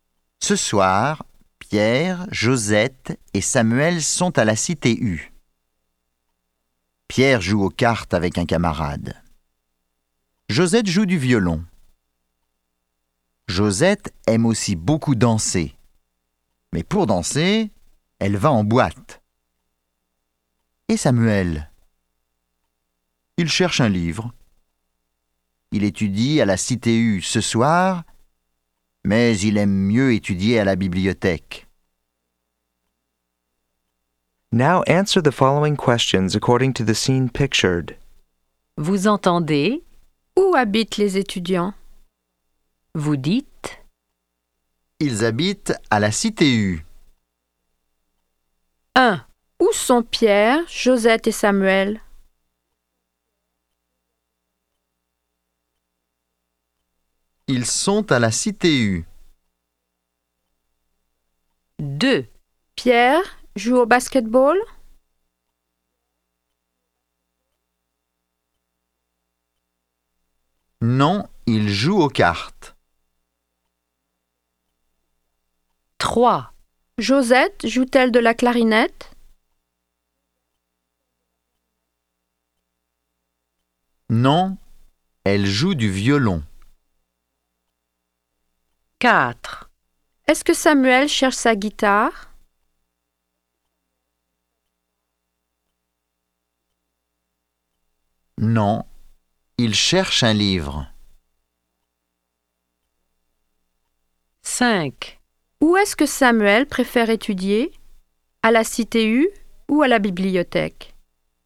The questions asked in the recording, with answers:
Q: Où sont Pierre, Josette et Samuel?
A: Ils sont à la Cité U.

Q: Pierre joue au basketball?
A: Non, il joue aux cartes.

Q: Josette joue-t-elle de la clarinette?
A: Non, elle joue du violon.

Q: Où est-ce que Samuel préfère étudier?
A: Il préfère étudier à la bibliothèque.